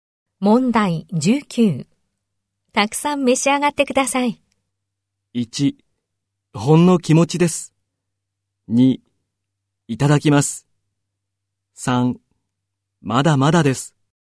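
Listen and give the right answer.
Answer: 2: いただきます。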